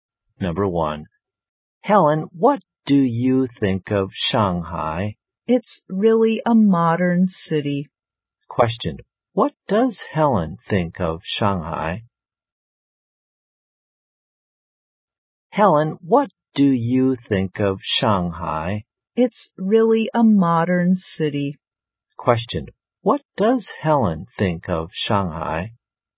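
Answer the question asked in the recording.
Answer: It's a really modern city.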